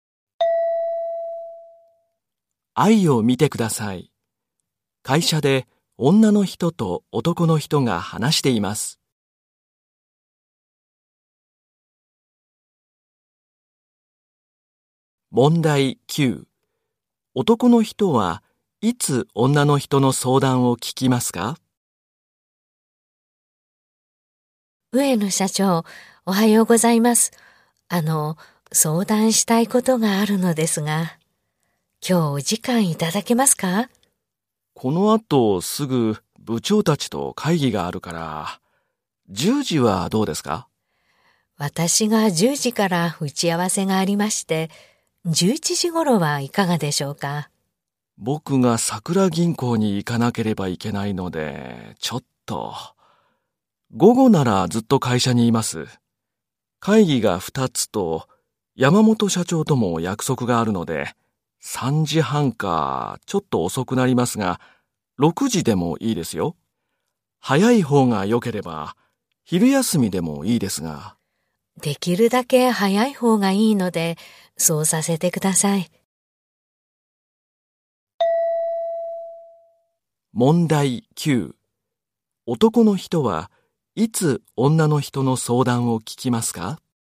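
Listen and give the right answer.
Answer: 昼休み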